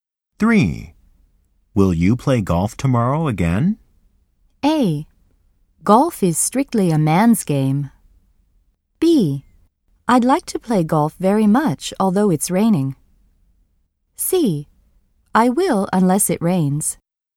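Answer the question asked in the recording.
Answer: C: I will unless it rains.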